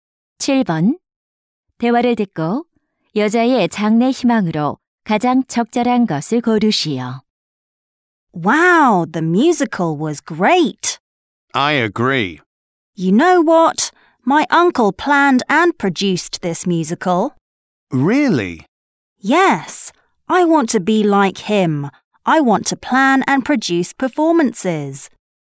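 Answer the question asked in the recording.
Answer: 공연 기획자(제작자)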